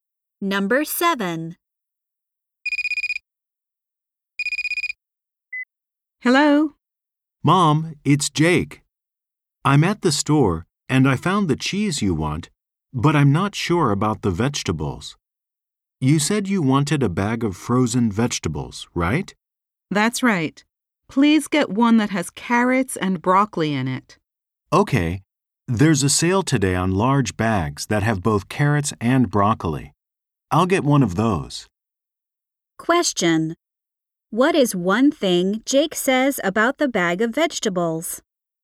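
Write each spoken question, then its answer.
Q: What is one thing Jake says about the bag of vegetables?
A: It is on sale today.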